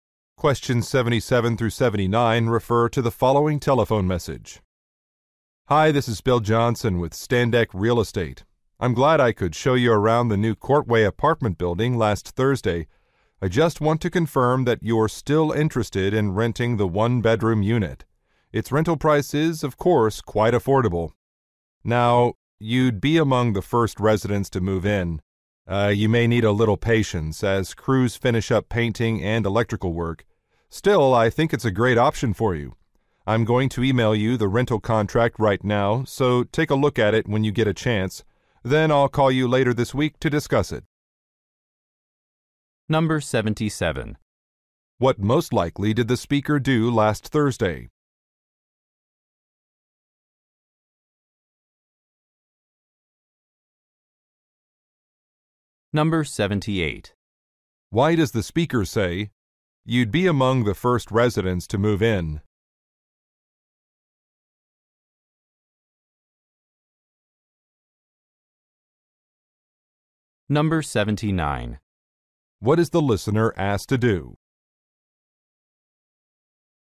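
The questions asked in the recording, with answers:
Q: What most likely did the speaker do last Thursday?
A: Showed the listener around an apartment building

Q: What is the listener asked to do?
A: Look over the rental contract sent by email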